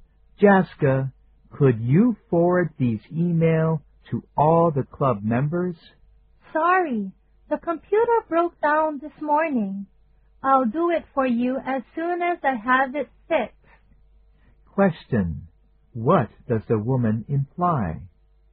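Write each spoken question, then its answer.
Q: What does the woman imply?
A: She can't forward the emails now because her computer is broken; she'll do it after it's fixed.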